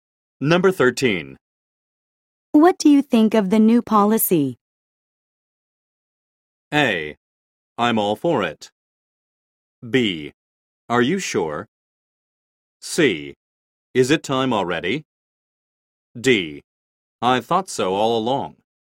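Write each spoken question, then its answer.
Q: What do you think of the new policy?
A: A: I'm all for it.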